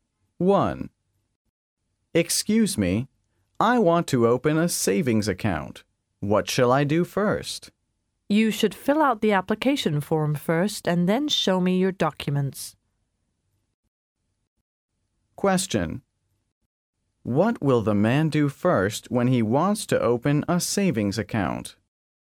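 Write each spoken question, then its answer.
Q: What will the man do first when he wants to open a savings account?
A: Fill out the application form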